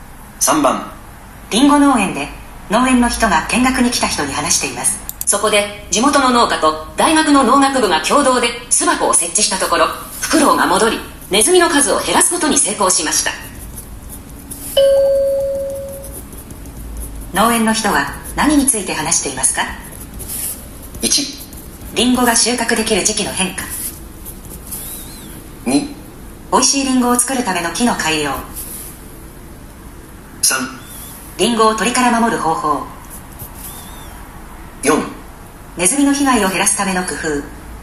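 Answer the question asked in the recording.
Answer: 4: ネズミの被害を減らすための工夫。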